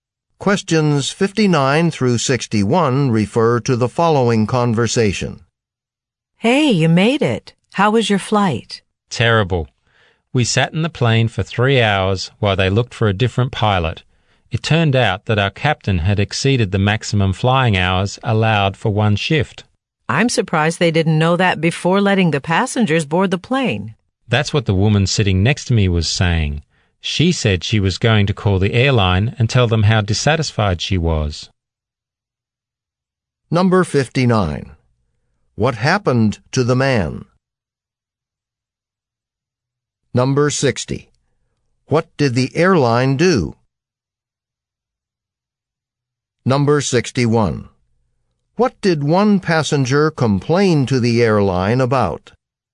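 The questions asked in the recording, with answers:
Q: What happened to the man?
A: His flight was delayed for 3 hours

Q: What did the airline do?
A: Looked for a different pilot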